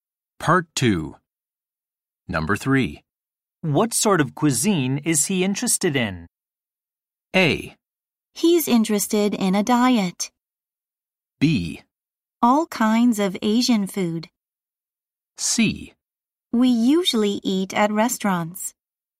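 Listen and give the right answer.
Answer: B: All kinds of Asian food.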